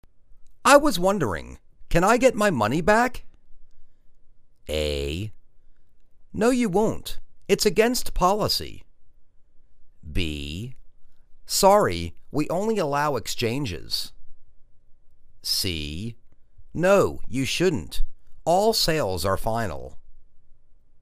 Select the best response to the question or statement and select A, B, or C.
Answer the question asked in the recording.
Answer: Sorry, we only allow exchanges.